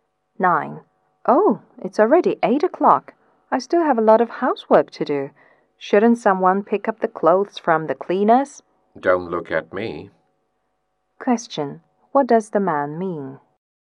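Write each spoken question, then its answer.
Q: What does the man mean?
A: He won't pick up the clothes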